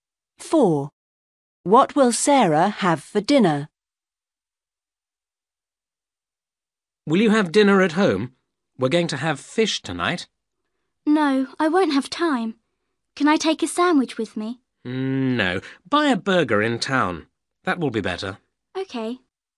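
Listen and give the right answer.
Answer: a burger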